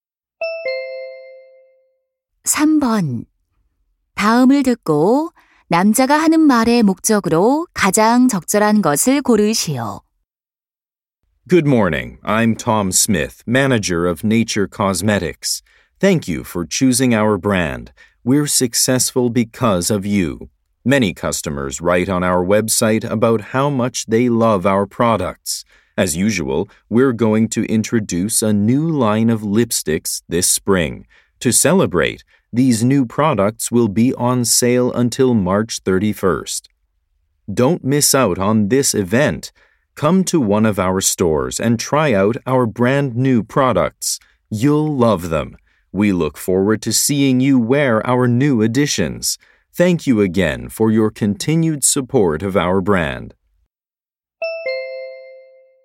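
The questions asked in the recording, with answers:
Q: 다음을 듣고 남자가 하는 말의 목적으로 가장 적절한 것을 고르시오.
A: 신제품 립스틱 출시 기념 할인 행사 홍보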